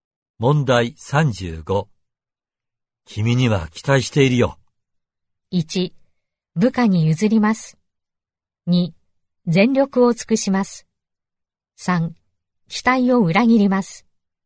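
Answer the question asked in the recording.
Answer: 2: 全力を尽くします。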